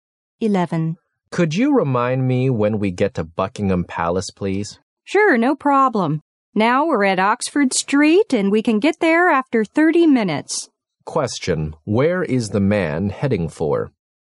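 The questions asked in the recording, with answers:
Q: where is the man heading for?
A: Buckingham Palace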